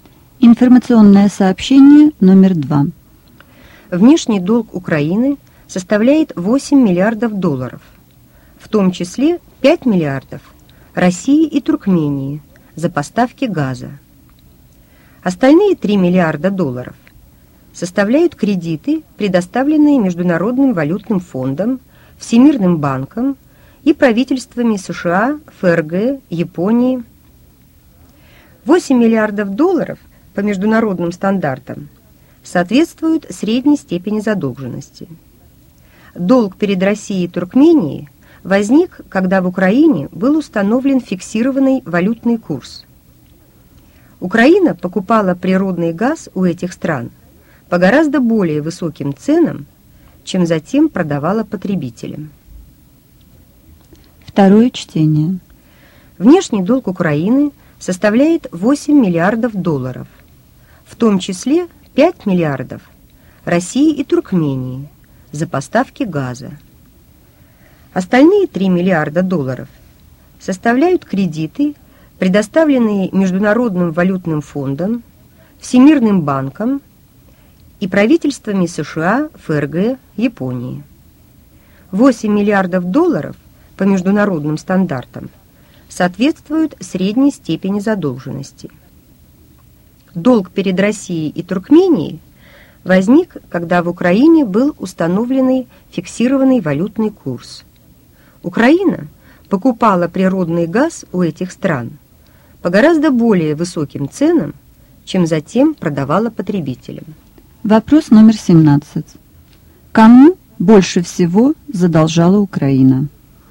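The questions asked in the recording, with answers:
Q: Кому больше всего задолжала Украина?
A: России и Туркмении (5 миллиардов долларов за газ)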